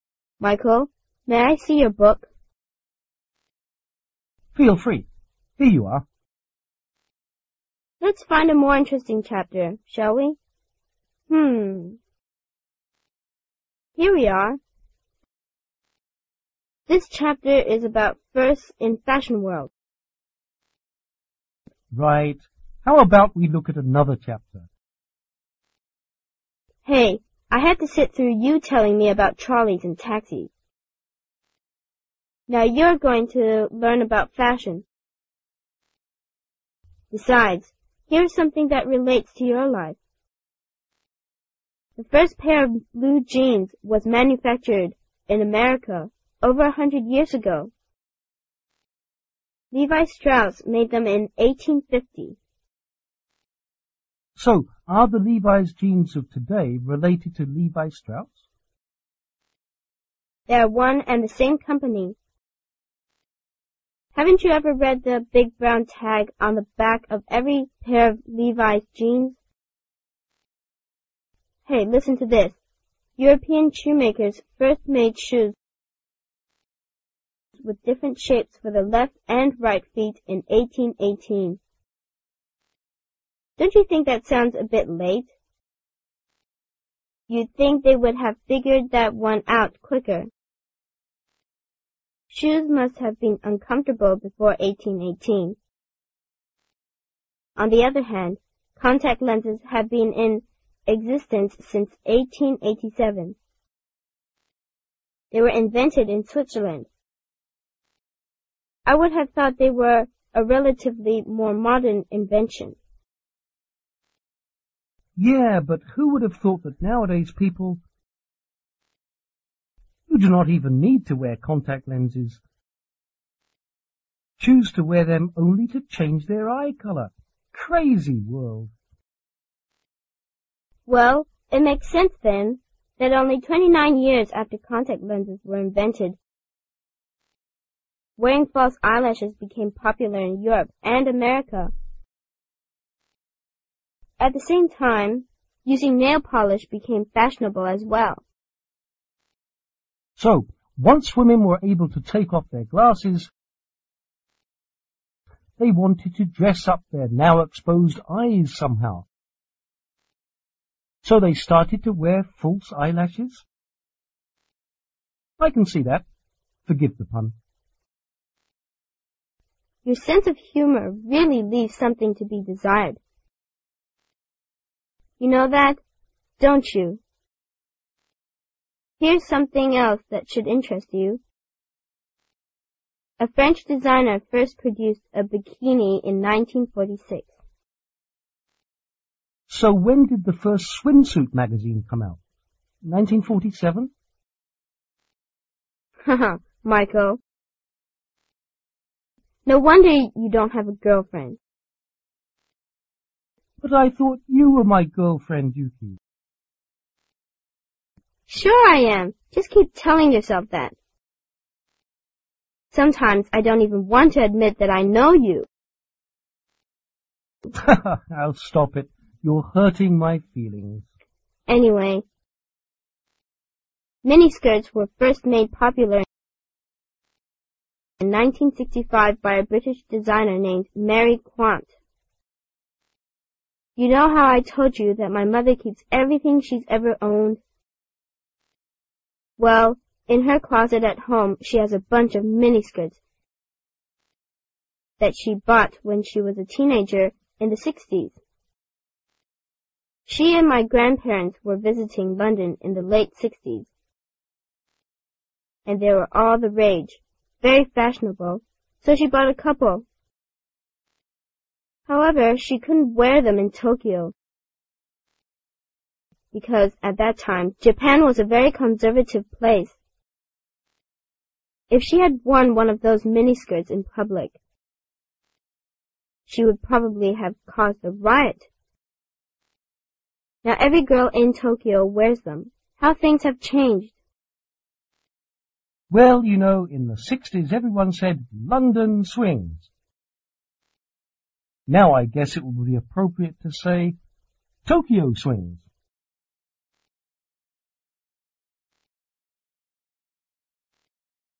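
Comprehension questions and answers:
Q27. Which country or region was different shapes for shoes intented in 1818?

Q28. When was contact Lenses first intented ?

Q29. Which country or region did False Eyelashes become popular?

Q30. When was Nail Polsih popular?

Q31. When was Bikini first intented ?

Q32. Which country or region did Miniskirts become popular?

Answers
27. Europe
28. 1887
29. Europe and America
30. 1916
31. 1946
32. Britain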